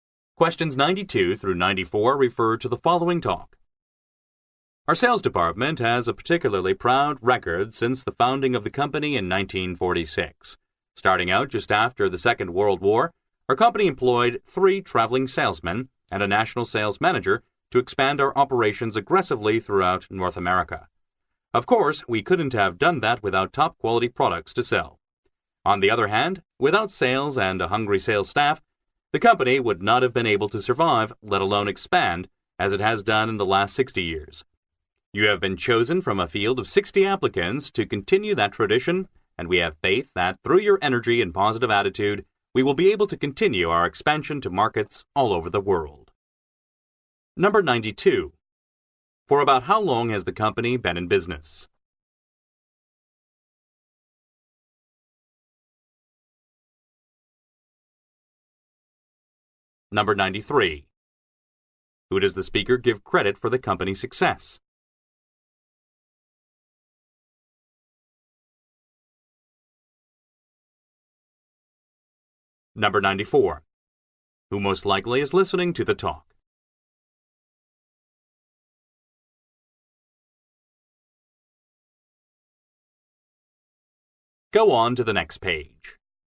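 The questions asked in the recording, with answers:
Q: For about how long has the company been in business?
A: About 60 years

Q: Who most likely is listening to the talk?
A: Newly hired sales staff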